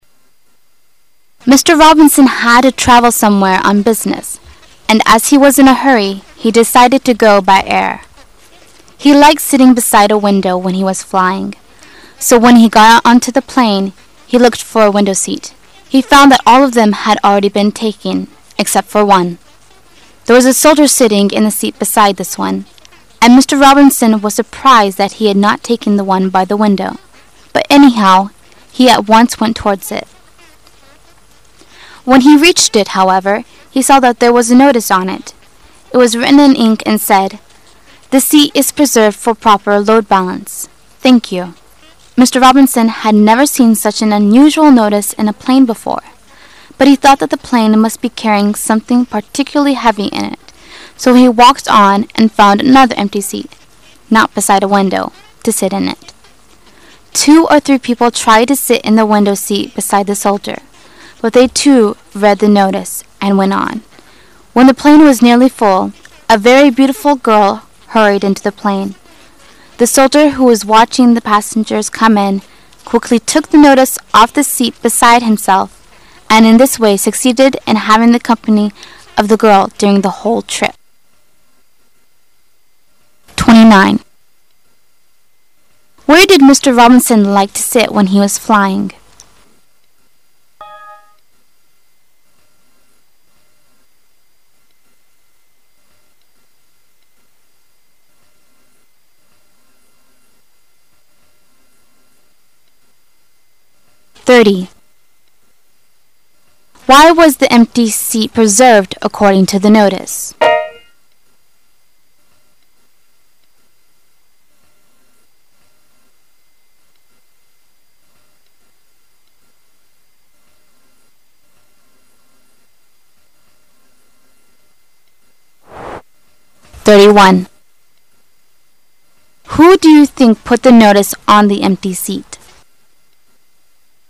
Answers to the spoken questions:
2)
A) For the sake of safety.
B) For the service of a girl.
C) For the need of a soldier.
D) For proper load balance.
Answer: D) For proper load balance.
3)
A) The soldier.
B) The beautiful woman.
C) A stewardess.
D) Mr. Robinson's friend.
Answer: A) The soldier.

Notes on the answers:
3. 推理判断。那位士兵看到女孩过来就拿下告示,请她就座,由此可推断出,告示应该是他放到座位上去的。

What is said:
Robinson had to travel somewhere on business, and as he was in a hurry, he decided to go by air. He liked sitting beside a window when he was flying, so when he got on to the plane, he looked for a window seat. He found all of them had already been taken except for one. There was a soldier sitting in the seat beside this one, and Mr. Robinson was surprised that he had not taken the one by the window; but, anyhow, he at once went towards it. When he reached it, however, he saw that there was a notice on it. It was written in ink and said, "This seat is preserved for proper load balance, thank you." Mr. Robinson had never seen such an unusual notice in a plane before, but he thought that the plane must be carrying something particularly heavy in it, so he walked on and found another empty seat, not beside a window, to sit in. Two or three people tried to sit in the window seat beside the soldier, but they too read the notice and went on, when the plane was nearly full, a very beautiful girl hurried into the plane. The soldier, who was watching the passengers coming in, quickly took the notice off the seat beside himself and in this way succeeded in having the company of the girl during the whole trip. Where did Mr. Robinson like to sit when he was flying?